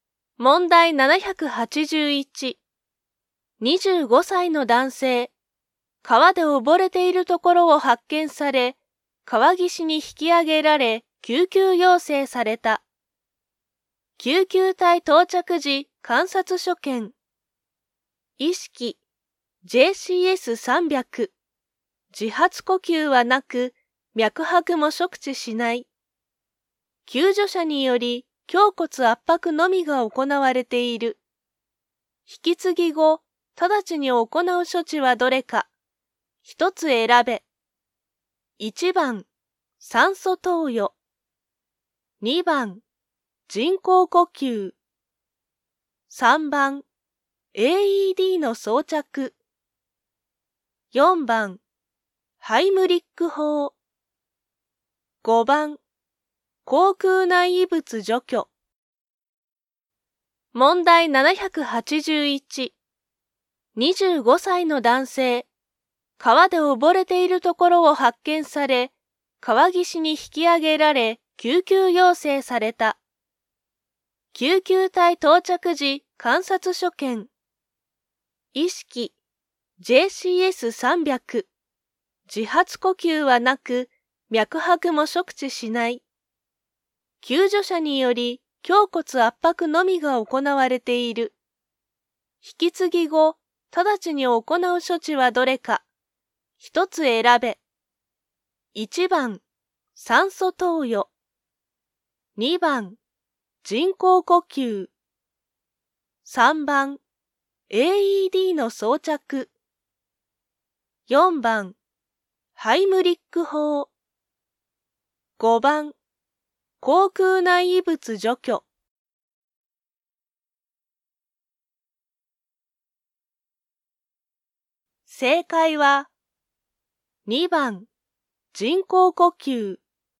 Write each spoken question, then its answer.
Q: 引き継ぎ後、直ちに行う処置はどれか。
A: 正解は、2番、人工呼吸。